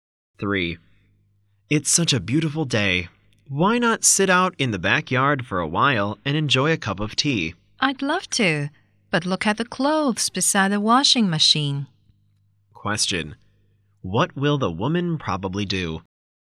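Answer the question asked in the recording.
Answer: Do the washing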